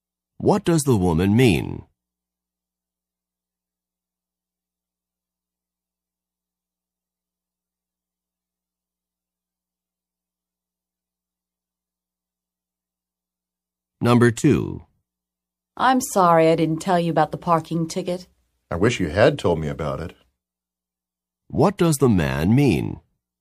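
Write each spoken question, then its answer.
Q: What does the man mean?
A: The woman did not tell him about the parking ticket.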